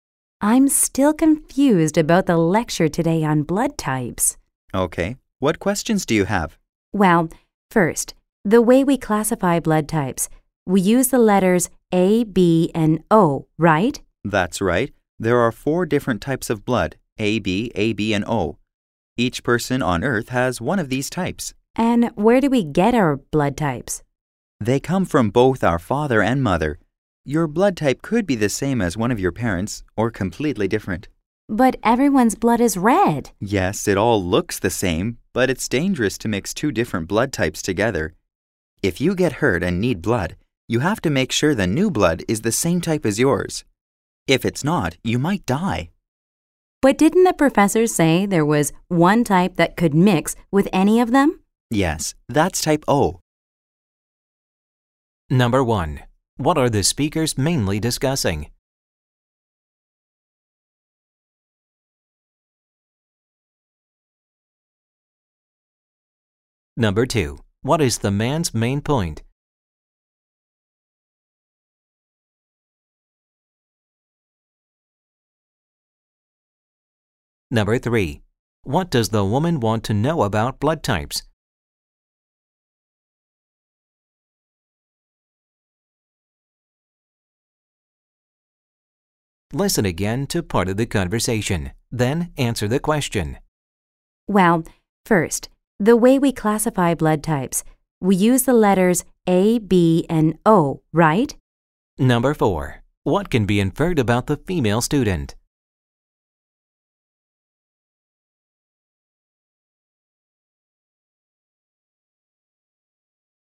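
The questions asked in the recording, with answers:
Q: What are the speakers mainly discussing?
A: Blood types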